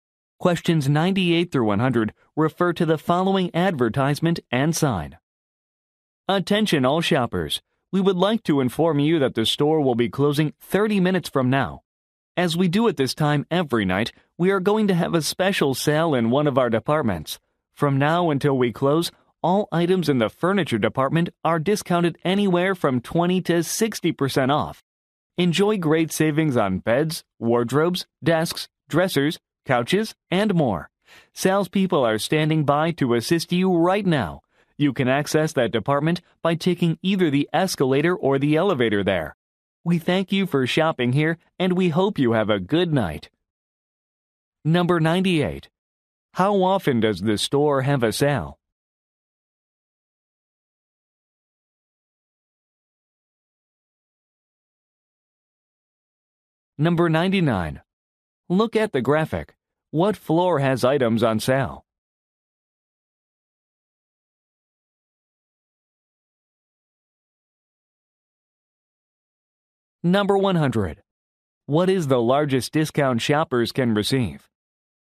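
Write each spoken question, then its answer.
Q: How often does the store have a sale?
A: Every night

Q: What is the largest discount shoppers can receive?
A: 60%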